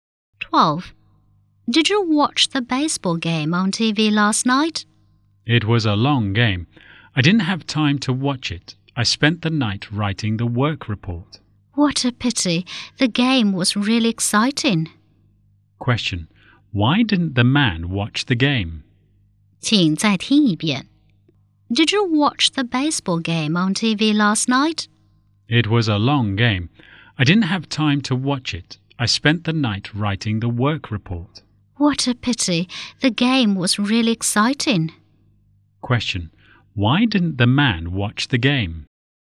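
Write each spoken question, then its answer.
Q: Question. Why didn't the man watch the game?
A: He spent the night writing the work report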